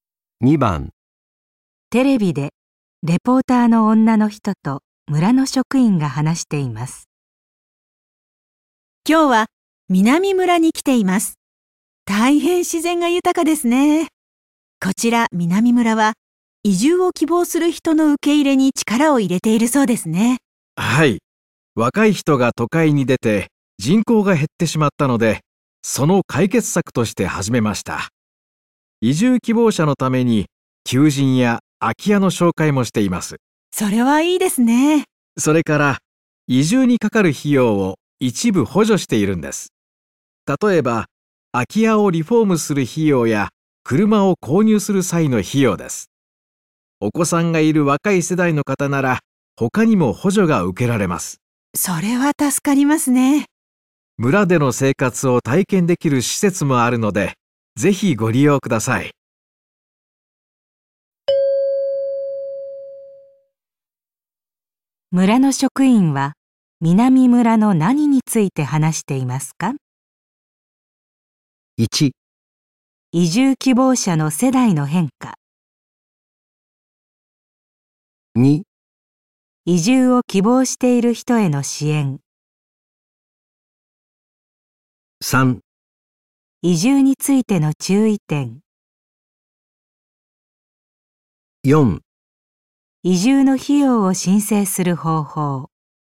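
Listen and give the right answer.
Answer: 2: 移住を希望している人への支援。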